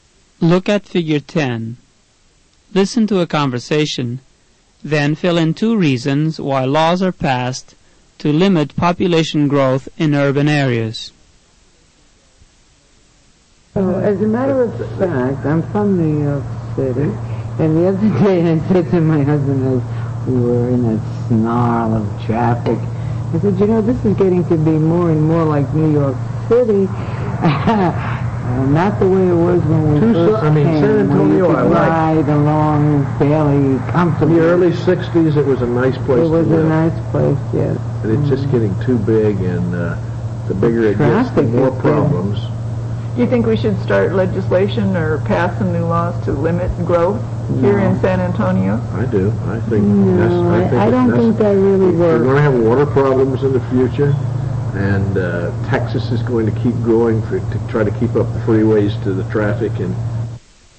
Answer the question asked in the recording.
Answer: there's too much traffic, and there's not enough water.